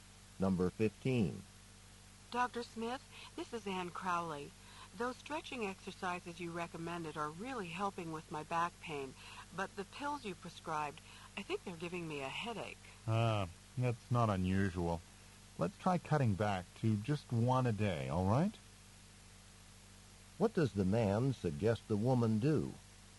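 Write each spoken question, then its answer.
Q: What does the man suggest the woman do?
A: Cut back to taking just one pill a day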